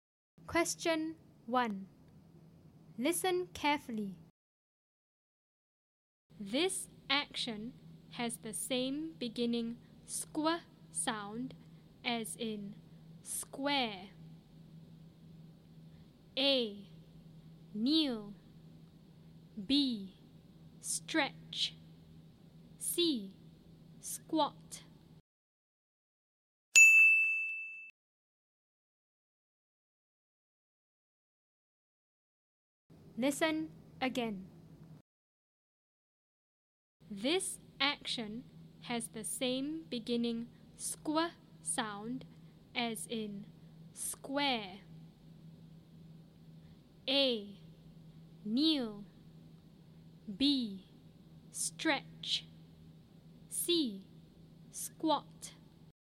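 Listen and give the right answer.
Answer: C: Squat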